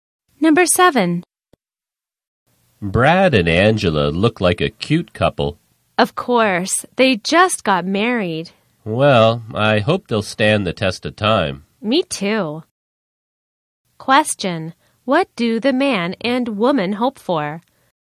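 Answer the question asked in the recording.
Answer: That Brad and Angela's marriage will stand the test of time.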